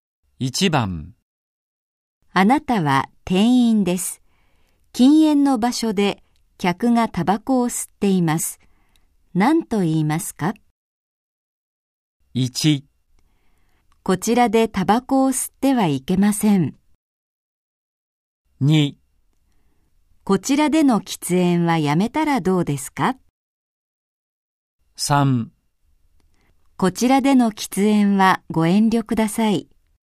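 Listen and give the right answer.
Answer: 3: こちらでの喫煙はご遠慮ください。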